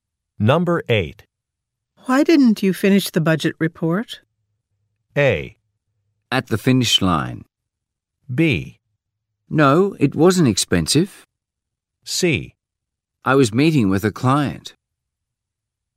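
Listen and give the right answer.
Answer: C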